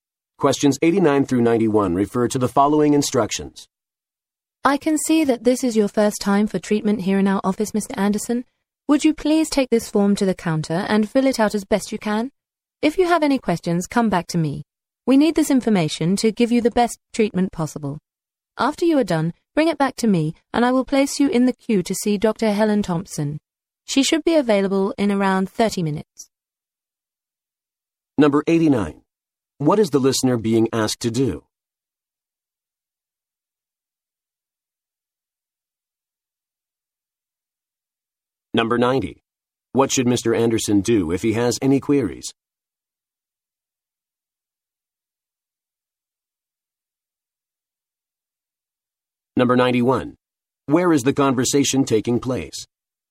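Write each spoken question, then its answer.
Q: What is the listener being asked to do?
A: Fill out a form

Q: What should Mr. Anderson do if he has any queries?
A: Come back to the speaker

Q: Where is the conversation taking place?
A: A doctor's office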